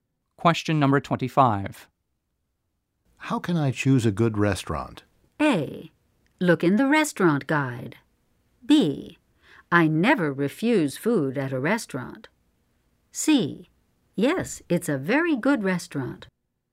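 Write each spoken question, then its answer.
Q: How can I choose a good restaurant?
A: A: Look in the restaurant guide.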